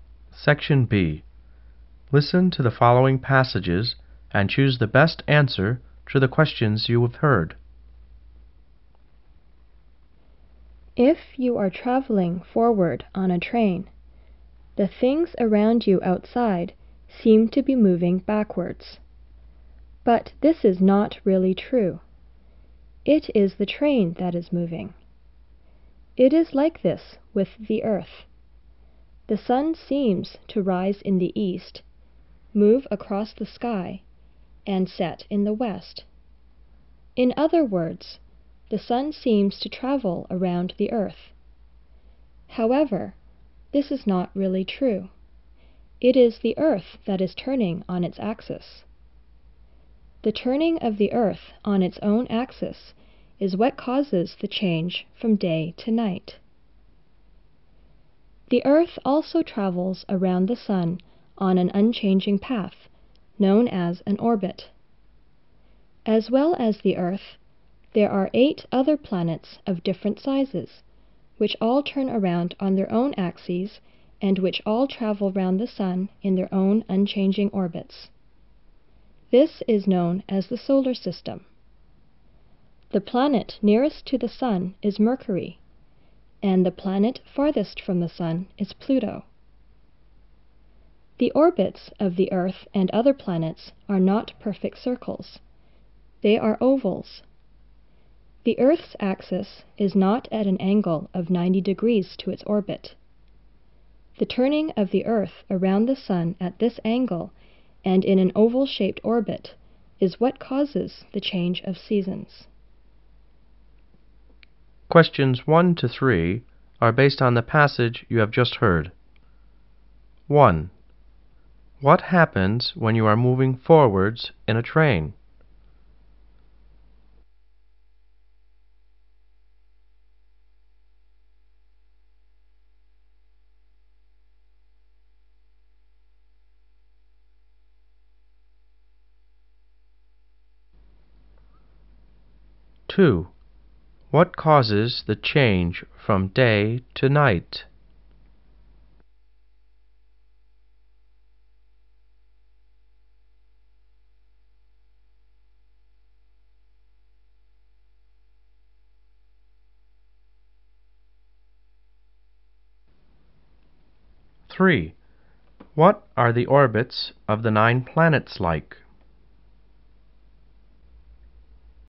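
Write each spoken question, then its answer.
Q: What happens when you are moving forwards in a train?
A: Things outside seem to move backwards

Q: what causes the change from day to night?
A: The Earth turning on its own axis

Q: what are the orbits of the 9 planets like?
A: Ovals, unchanging paths, not perfect circles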